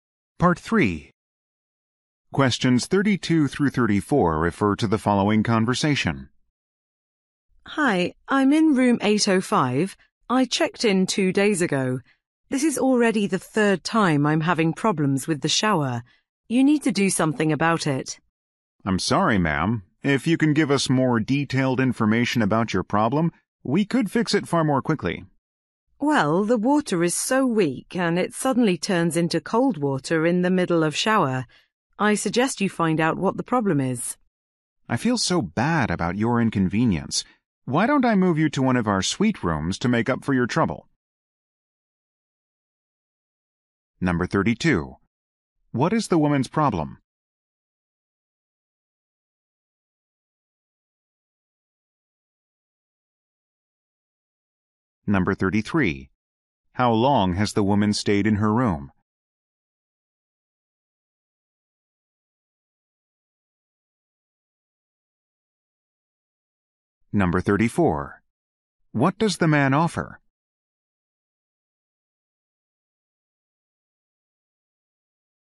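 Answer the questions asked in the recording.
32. Her shower does not work properly (weak water that turns cold)
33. 2 days
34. To move her to a suite room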